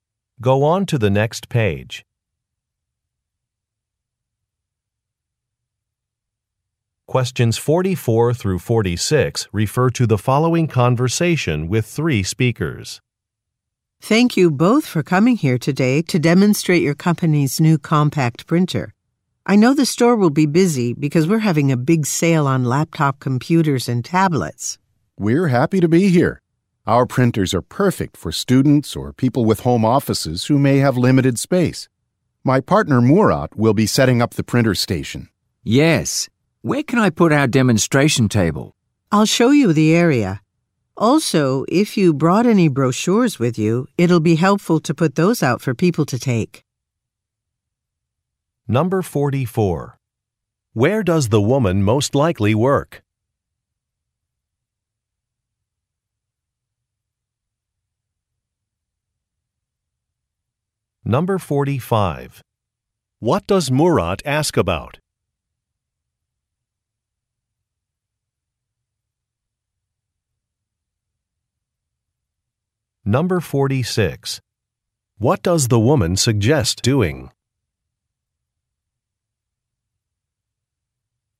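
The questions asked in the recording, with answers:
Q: Where does the woman most likely work?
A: At an electronics store

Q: What does Murat ask about?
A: Where to put the demonstration table

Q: What does the woman suggest doing?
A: Putting out brochures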